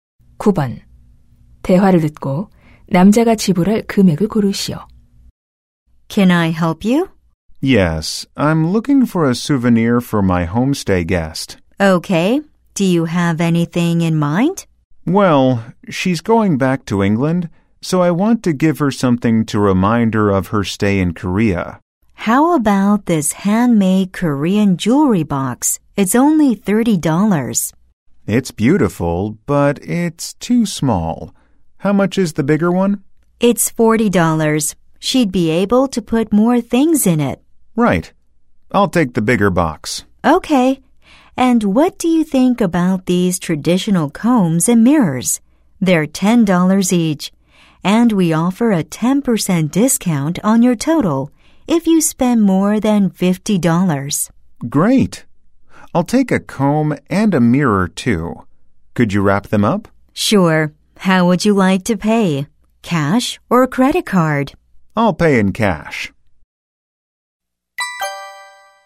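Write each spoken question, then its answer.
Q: 대화를 듣고 남자가 지불할 금액을 고르시오.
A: $54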